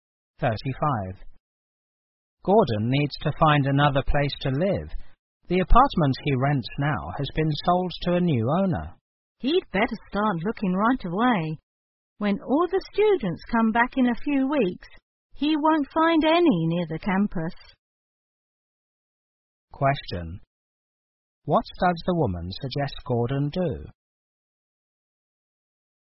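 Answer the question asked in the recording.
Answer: Start looking for a new apartment right away.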